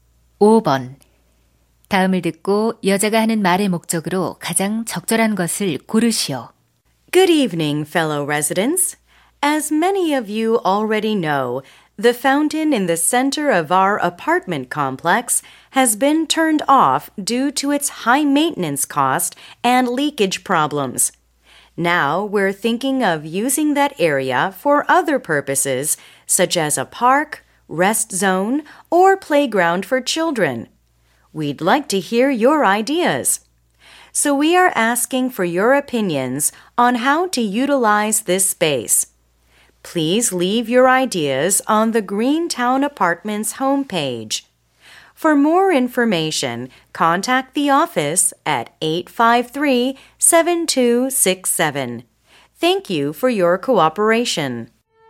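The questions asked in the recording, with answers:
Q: 다음을 듣고 여자가 하는 말의 목적으로 가장 적절한 것을 고르시오.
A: 분수대 공간 활용에 대한 주민 의견 요청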